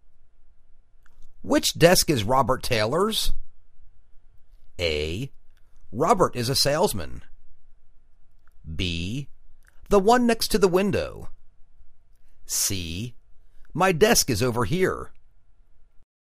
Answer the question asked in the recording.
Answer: The one next to the window.